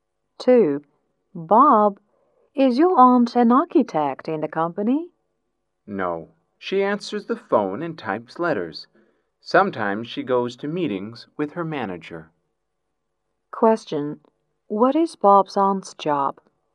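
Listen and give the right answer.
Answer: A secretary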